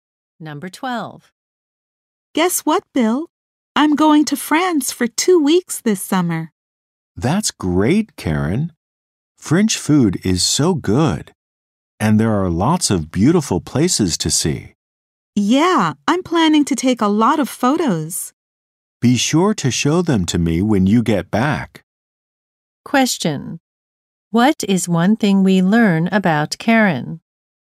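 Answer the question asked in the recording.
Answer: She is going to France for two weeks this summer.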